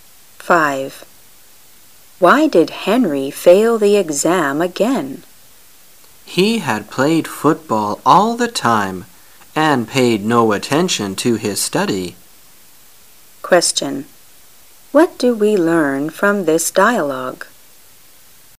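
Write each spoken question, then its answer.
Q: Question: What do we learn from this dialogue?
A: Henry failed because he played football all the time and didn't study

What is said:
[解析] W: Why did Henry fail the exam again? M: He had played football all the time and paid no attention to his study. Q: What do we learn from this dialogue?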